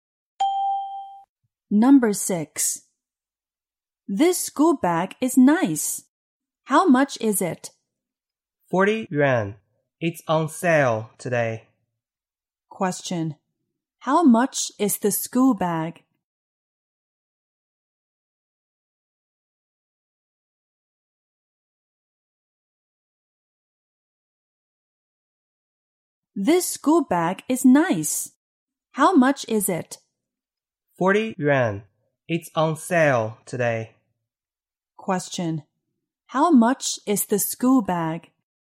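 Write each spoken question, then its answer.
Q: How much is the school bag?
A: 40 yuan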